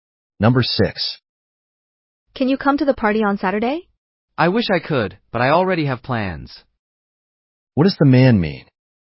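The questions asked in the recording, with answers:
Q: What does the man mean?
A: He can't come to the party because he already has plans.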